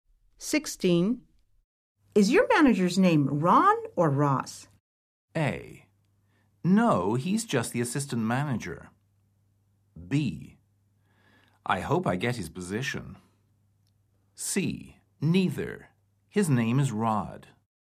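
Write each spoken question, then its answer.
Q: Is your manager's name Ron or Ross?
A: C: Neither. His name is Rod.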